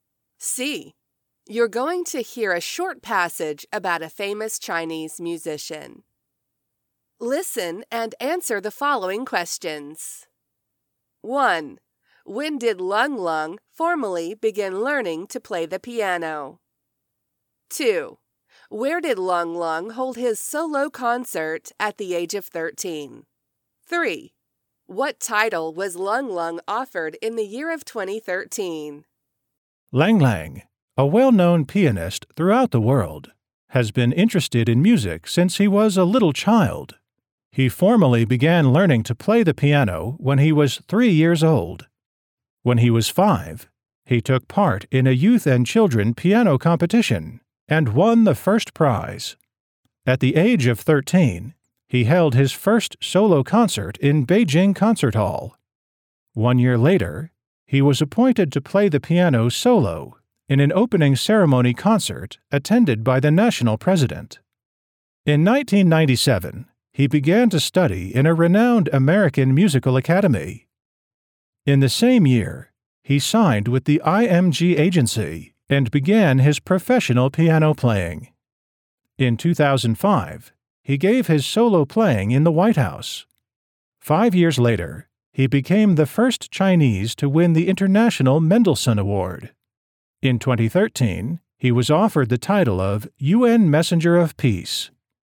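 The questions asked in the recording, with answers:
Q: When did Lung Lung formally begin learning to play the piano?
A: When he was 3 years old

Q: Where did Lung Lung hold his solo concert at the age of 13?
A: In Beijing Concert Hall

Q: What title was Lung Lung offered in the year of 2013?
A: UN Messenger of Peace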